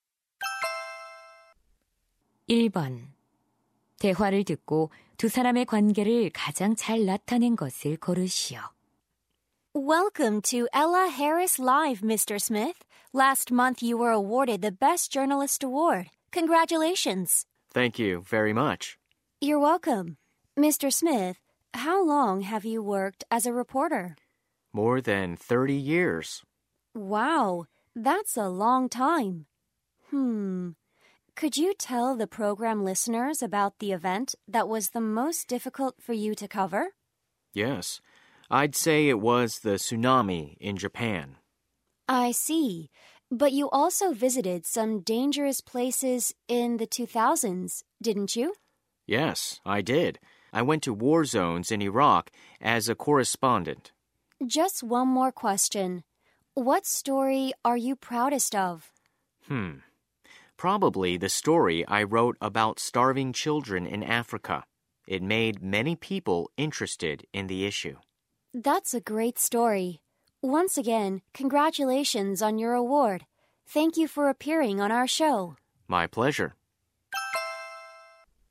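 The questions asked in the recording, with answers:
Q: 대화를 듣고 두 사람의 관계를 가장 잘 나타낸 것을 고르시오.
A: 방송 진행자 - 기자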